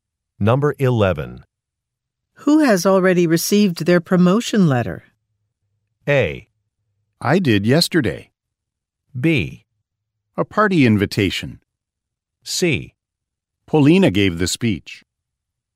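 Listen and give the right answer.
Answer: A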